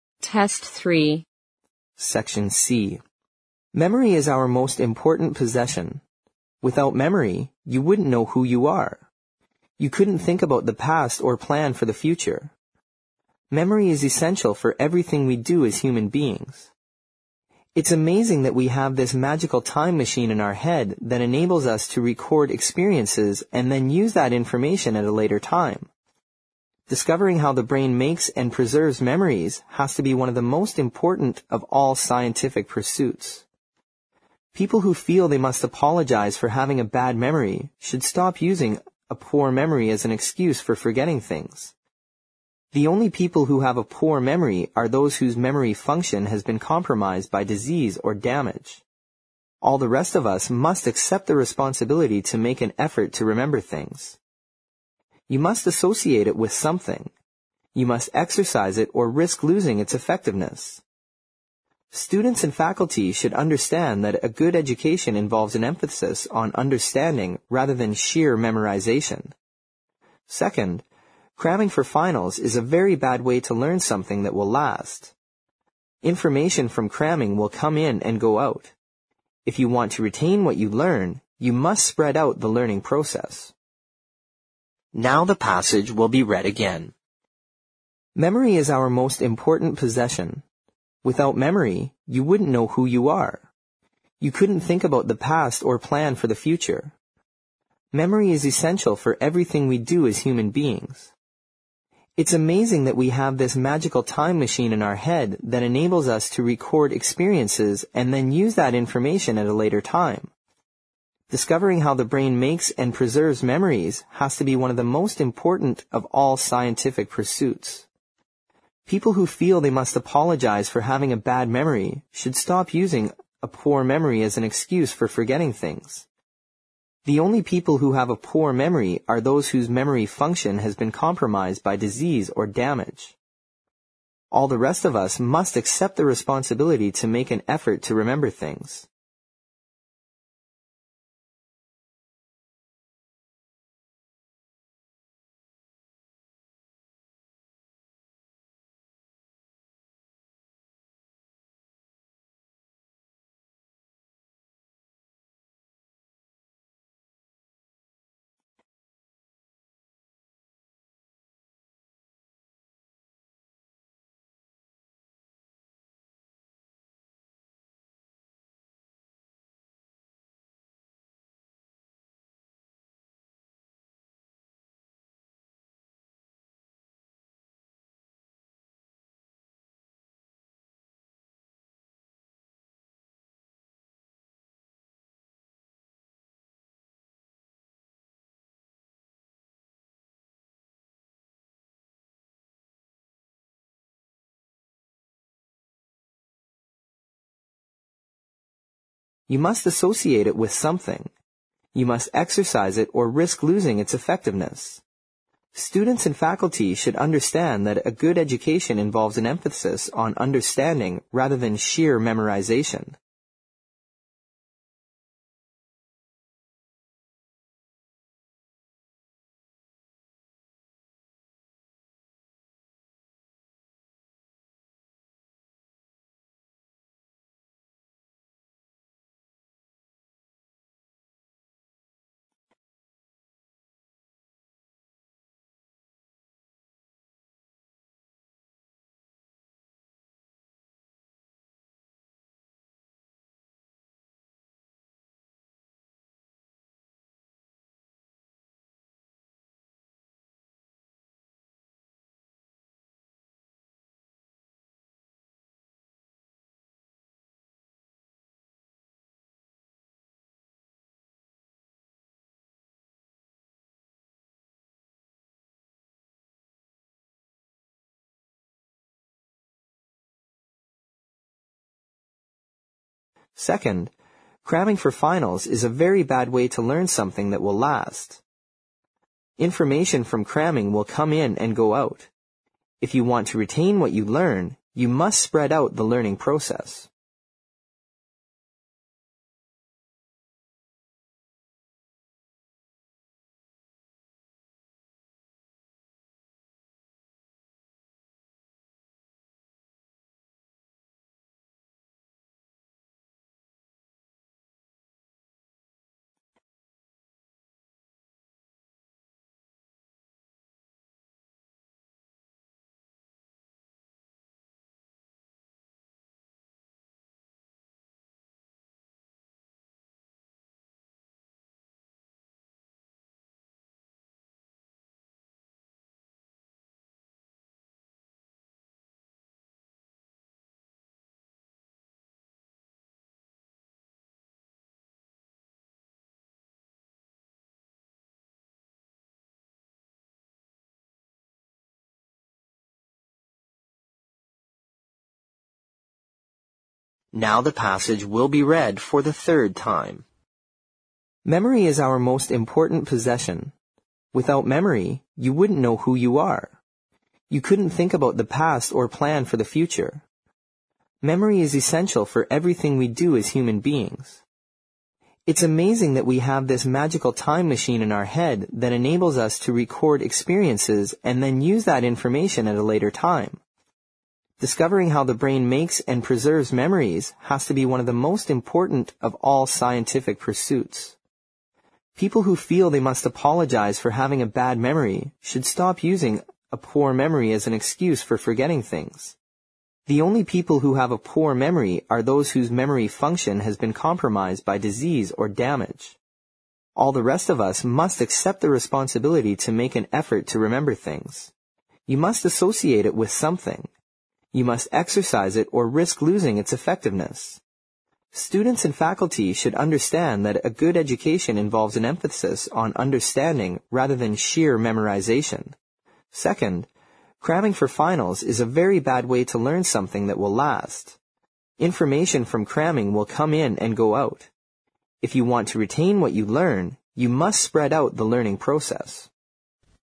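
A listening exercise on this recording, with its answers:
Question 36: Memory is (36) ______ for everything we do as human beings.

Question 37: It's (37) ______ that we have this magical time machine in our heads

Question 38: (38) ______ us to record experiences and then use that information at a later time.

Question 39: (39) ______ how the brain makes and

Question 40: (40) ______ memories has to be one of the most important of all scientific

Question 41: (41) ______ .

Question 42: People who feel they must (42) ______ for having a bad memory should stop using a poor memory as an excuse for forgetting things.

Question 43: The only people who have a poor memory are those whose memory function has been (43) ______ by disease or damage.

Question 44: (44) _____________________________________________________________ .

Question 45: (45) _______________________________________________________________ .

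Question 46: (46) ______________________________________________________ .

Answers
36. essential
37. amazing
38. enables
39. Discovering
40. preserves
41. pursuits
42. apologize
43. compromised
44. All the rest of us must accept the responsibility to make an effort to remember things.
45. Students and faculty should understand that a good education involves an emphasis on understanding rather than sheer memorization.
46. If you want to retain what you learn, you must spread out the learning process.

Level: 四级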